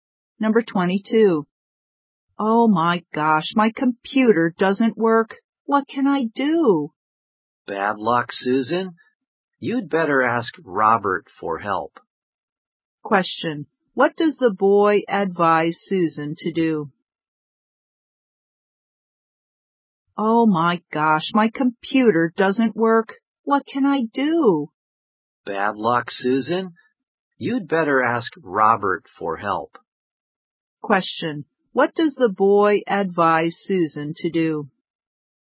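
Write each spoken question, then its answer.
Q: What does the boy advise Susan to do?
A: Ask Robert for help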